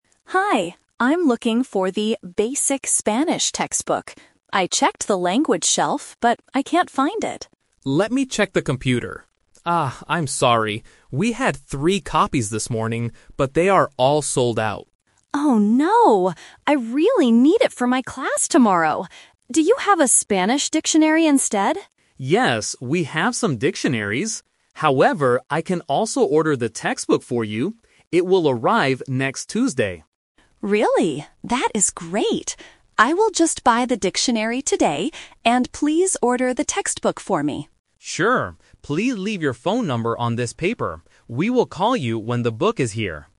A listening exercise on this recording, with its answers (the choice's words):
Listen to a conversation between a customer and a bookstore clerk. Choose the correct answer A, B, or C.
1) What book was the customer looking for at first?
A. A computer book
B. A Spanish textbook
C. A Spanish dictionary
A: A Spanish textbook

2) When will the ordered book arrive at the store?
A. Tomorrow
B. This morning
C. Next Tuesday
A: Next Tuesday

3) What must the customer do to order the book?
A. Pay for the book today.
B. Leave her phone number.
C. Call the bookstore next week.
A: Leave her phone number.

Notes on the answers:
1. Sarah says at the very beginning, "I'm looking for the 'Basic Spanish' textbook."
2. The clerk explicitly says, "It will arrive next Tuesday."
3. The clerk tells her, "Please leave your phone number on this paper."

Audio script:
Sarah: Hi, I'm looking for the "Basic Spanish" textbook. I checked the language shelf, but I can't find it.
Mark: Let me check the computer. Ah, I'm sorry. We had three copies this morning, but they are all sold out.
Sarah: Oh no! I really need it for my class tomorrow. Do you have a Spanish dictionary instead?
Mark: Yes, we have some dictionaries. However, I can also order the textbook for you. It will arrive next Tuesday.
Sarah: Really? That is great. I will just buy the dictionary today, and please order the textbook for me.
Mark: Sure! Please leave your phone number on this paper. We will call you when the book is here.